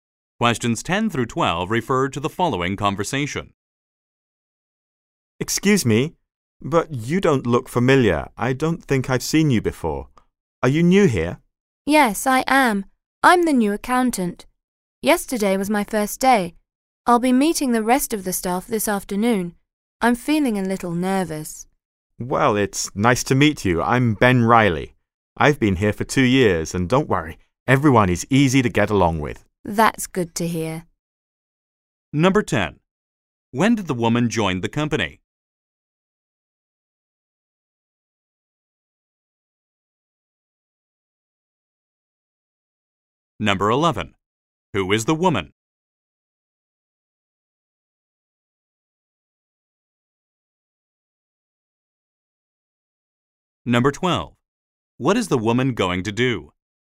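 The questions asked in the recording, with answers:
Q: When did the woman join the company?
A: Yesterday

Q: Who is the woman?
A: The new accountant

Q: What is the woman going to do?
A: Meet the rest of the staff this afternoon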